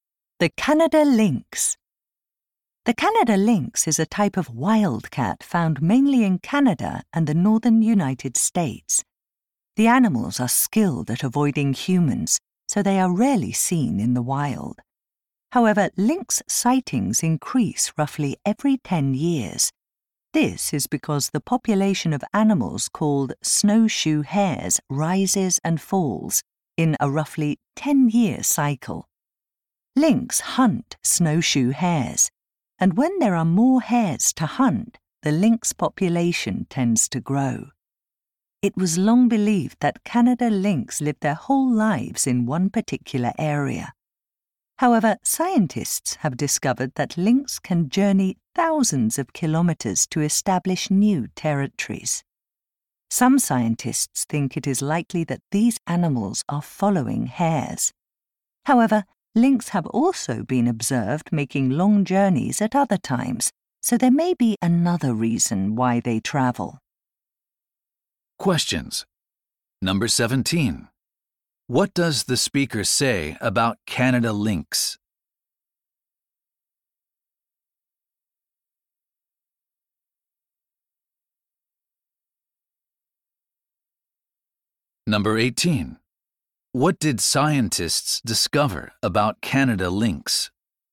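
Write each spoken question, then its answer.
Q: What does the speaker say about Canada lynx?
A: Sightings of them increase roughly every 10 years, following the snowshoe hare population cycle.

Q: What did scientists discover about Canada lynx?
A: They can travel thousands of kilometers to establish new territories.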